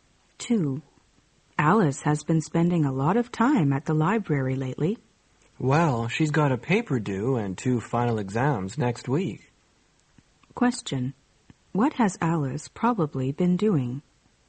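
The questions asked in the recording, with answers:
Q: What has Alice probably been doing?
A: Studying for exams and writing a paper.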